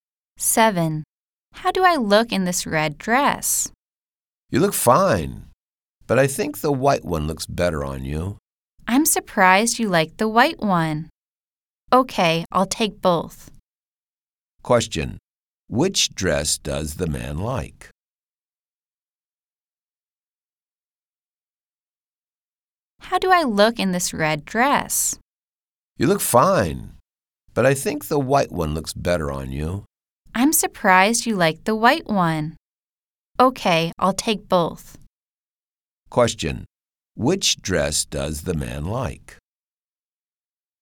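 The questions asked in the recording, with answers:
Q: Question. Which dress does the man like?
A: The white one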